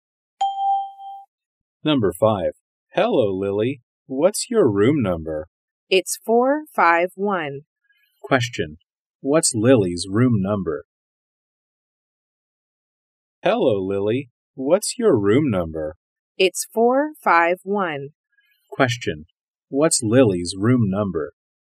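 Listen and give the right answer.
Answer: 451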